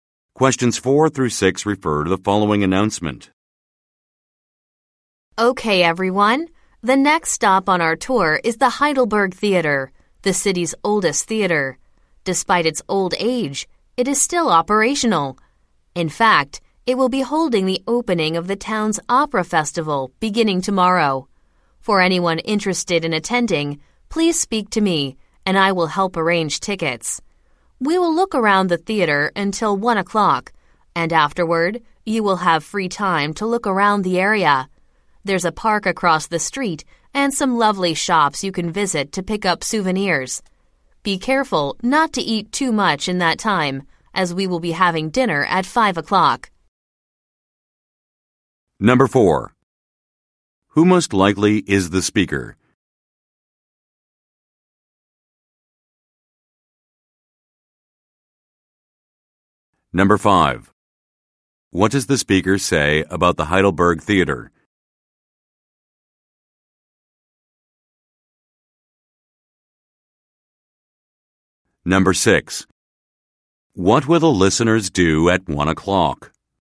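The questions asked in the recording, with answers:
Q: Who most likely is the speaker?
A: A tour guide

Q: What does the speaker say about the Heidelberg Theater?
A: It is the city's oldest theater and still operational

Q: What will the listeners do at 1 o'clock?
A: Have free time to look around the area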